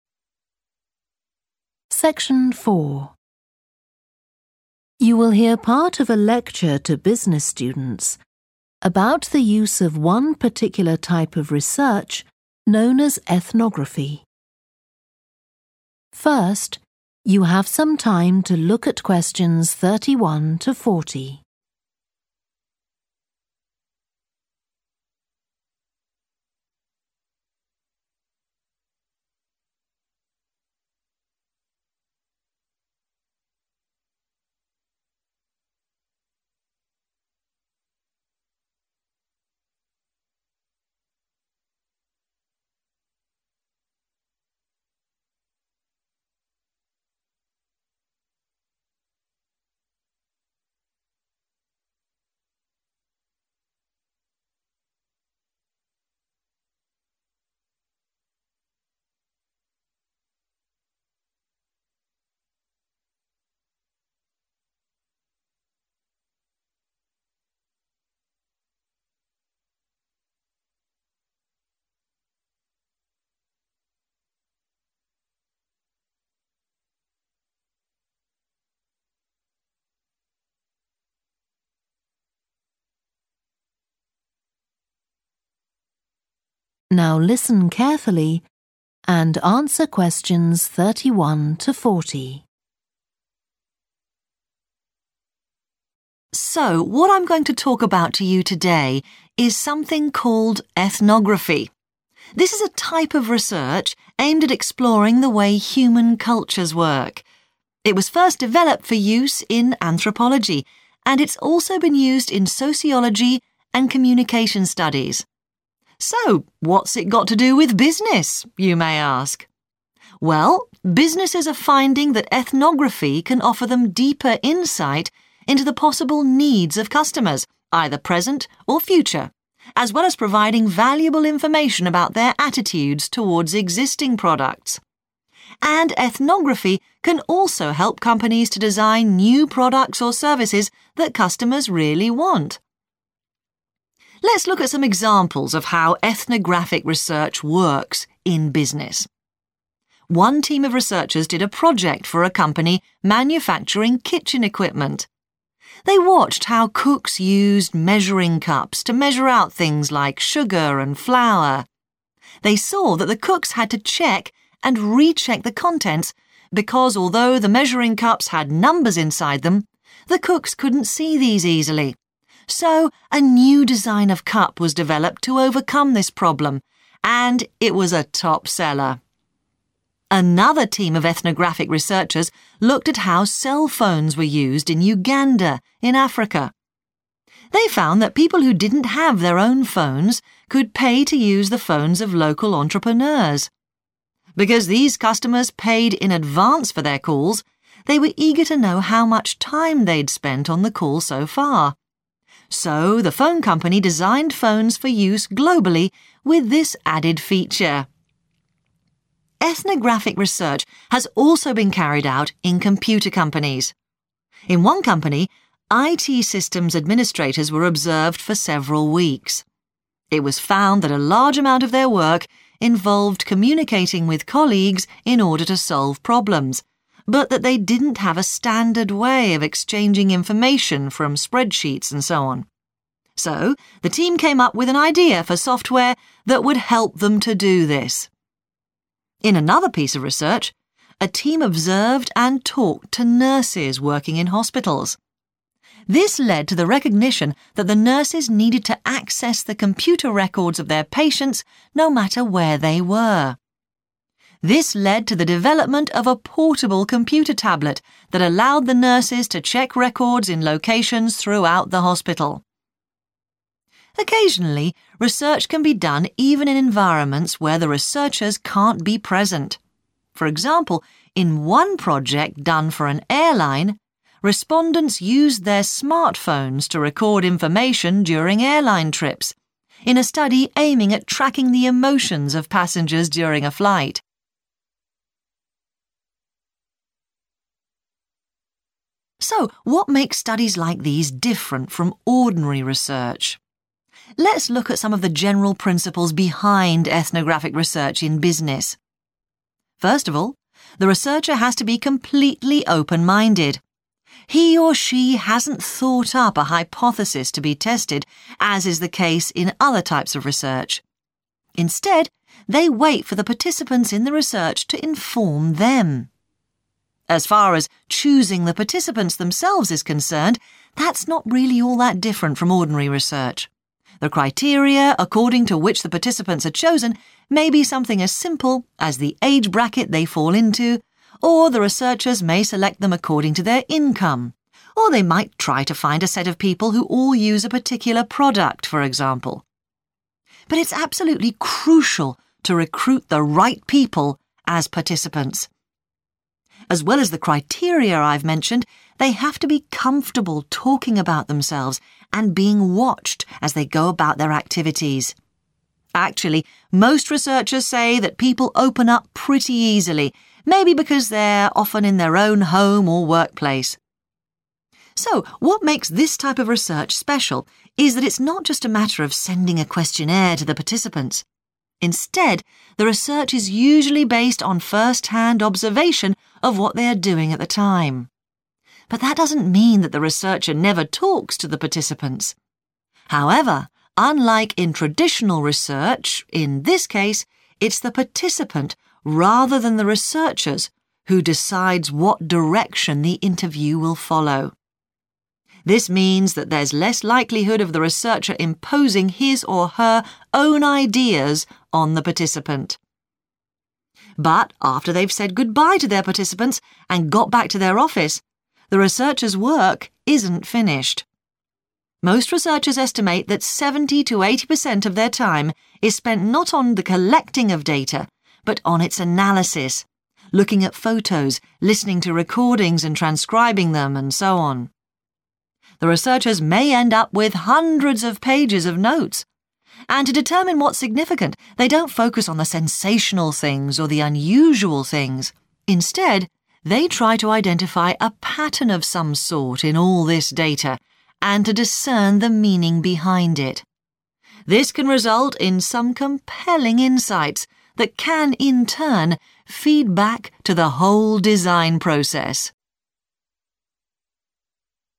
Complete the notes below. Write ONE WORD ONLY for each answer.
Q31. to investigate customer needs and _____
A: attitude / attitudes

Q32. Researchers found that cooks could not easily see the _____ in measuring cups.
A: numbers

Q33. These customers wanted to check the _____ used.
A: time / minutes

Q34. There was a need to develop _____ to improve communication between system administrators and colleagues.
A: software

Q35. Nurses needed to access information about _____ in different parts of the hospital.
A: patients

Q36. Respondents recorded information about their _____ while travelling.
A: emotions / feelings

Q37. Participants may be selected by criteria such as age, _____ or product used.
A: income

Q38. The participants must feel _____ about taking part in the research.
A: comfortable

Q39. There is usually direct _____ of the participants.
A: observation

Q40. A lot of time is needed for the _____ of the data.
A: analysis

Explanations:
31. The correct answer is 'attitudes' because the excerpt says businesses use ethnography to understand customer needs and 'attitudes', which means how they feel about things. It matches the excerpt's meaning of understanding customer opinions.
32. The correct answer fits perfectly with the context of the excerpt, where it mentions that the cooks faced an issue because they couldn't easily see the numbers inside the measuring cups. This indicates that 'numbers' is the specific missing piece of information.
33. The correct answer is 'time' because the people were asking for information about how long they had been on the call, which is measured in time.
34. The correct answer is 'software' because the excerpt is talking about an idea to solve a problem by creating a computer program that helps people share information from spreadsheets.
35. The correct answer is 'patients' because the excerpt specifically talks about nurses needing to access information about their patients in different parts of the hospital. This fits in with the context of hospital operations and patient care.
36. The correct answer matches the context of the excerpt where the study aimed to track the emotions of passengers. It aligns with understanding how participants felt during the research process.
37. The correct answer is 'income' because the transcript clearly states that researchers may select participants based on their income. This means researchers look at how much money people make to choose who will be part of the study.
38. The correct answer is 'comfortable' because it is important for participants in ethnographic research to feel comfortable talking about themselves and being observed. This helps them to share their true thoughts and behavior, which is crucial for effective research.
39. The correct answer 'observation' is right because the excerpt explains that the research usually gets its information by watching people, which is the definition of 'observation'.
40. The correct answer is 'analysis' because it matches the part of the transcript that explains that most of the researchers' time goes to understanding and processing the collected data, rather than just gathering it.

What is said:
So what I'm going to talk about to you today is something called Ethnography. This is a type of research aimed at exploring the way human cultures work. It was first developed for use in anthropology, and it's also been used in sociology and communication studies. So what's it got to do with business, you may ask. Well, businesses are finding that ethnography can offer them deeper insight into the possible needs of customers, either present or future, as well as providing valuable information about their attitudes towards existing products. And ethnography can also help companies to design new products or services that customers really want.
Let's look at some examples of how ethnographic research works in business. One team of researchers did a project for a company manufacturing kitchen equipment. They watched how cooks used measuring cups to measure out things like sugar and flour. They saw that the cooks had to check and recheck the contents, because although the measuring cups had numbers inside them, the cooks couldn't see these easily. So a new design of cup was developed to overcome this problem, and it was a top seller.
Another team of ethnographic researchers looked at how cell phones were used in Uganda, in Africa. They found that people who didn't have their own phones could pay to use the phones of local entrepreneurs. Because these customers paid in advance for their calls, they were eager to know how much time they'd spent on the call so far. So the phone company designed phones for use globally with this added feature.
Ethnographic research has also been carried out in computer companies. In one company, IT systems administrators were observed for several weeks. It was found that a large amount of their work involved communicating with colleagues in order to solve problems, but that they didn't have a standard way of exchanging information from spreadsheets and so on. So the team came up with an idea for software that would help them to do this.
In another piece of research, a team observed and talked to nurses working in hospitals. This led to the recognition that the nurses needed to access the computer records of their patients, no matter where they were. This led to the development of a portable computer tablet that allowed the nurses to check records in locations throughout the hospital.
Occasionally, research can be done even in environments where the researchers can't be present. For example, in one project done for an airline, respondents used their smartphones to record information during airline trips, in a study aiming at tracking the emotions of passengers during a flight.
So what makes studies like these different from ordinary research? Let's look at some of the general principles behind ethnographic research in business. First of all, the researcher has to be completely open-minded – he or she hasn't thought up a hypothesis to be tested, as is the case in other types of research. Instead they wait for the participants in the research to inform them. As far as choosing the participants themselves is concerned, that's not really all that different from ordinary research – the criteria according to which the participants are chosen may be something as simple as the age bracket they fall into, or the researchers may select them according to their income, or they might try to find a set of people who all use a particular product, for example. But it's absolutely crucial to recruit the right people as participants. As well as the criteria I've mentioned, they have to be comfortable talking about themselves and being watched as they go about their activities. Actually, most researchers say that people open up pretty easily, maybe because they're often in their own home of workplace.
So what makes this type of research special is that it's not just a matter of sending a questionnaire to the participants, instead the research is usually based on first-hand observation of what they are doing at the time. But that doesn't mean that the researcher never talks to the participants. However, unlike in traditional research, in this case it's the participant rather than the researchers who decides what direction the interview will follow. This means that there's less likelihood of the researcher imposing his or her own ideas on the participant.
But after they've said goodbye to their participants and got back to their office, the researchers' work isn't finished. Most researchers estimate that 70 to 80 per cent of their time is spent not on the collecting of data but on its analysis – looking at photos listening to recording and transcribing them and so on. The researchers may end up with hundreds of pages of notes. And to determine what's significant, they don't focus on the sensational things or the unusual things, instead they try to identify a pattern of some sort in all this data, and to discern the meaning behind it. This can result in some compelling insights that can in turn feed back to the whole design process.